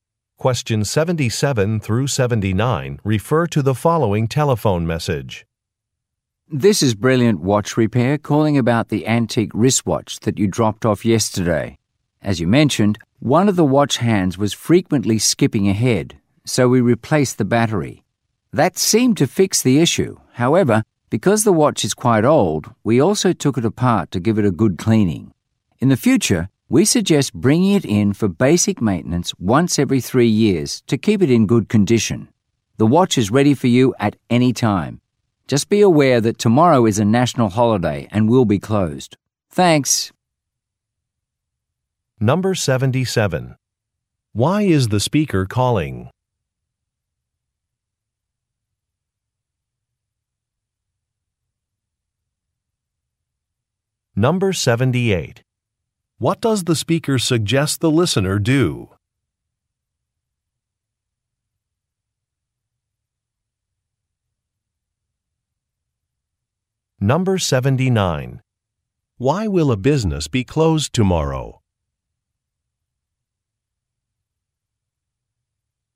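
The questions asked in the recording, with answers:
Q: Why is the speaker calling?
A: To say a watch has been repaired

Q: What does the speaker suggest the listener do?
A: Bring the watch in for maintenance every 3 years

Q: Why will a business be closed tomorrow?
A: It is a national holiday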